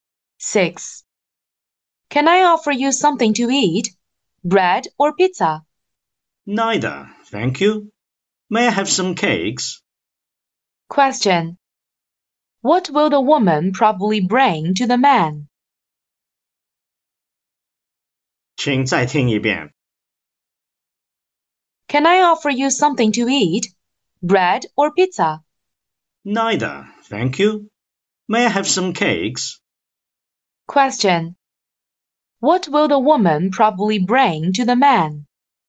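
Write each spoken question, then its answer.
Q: What will the woman probably bring to the man?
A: Some cakes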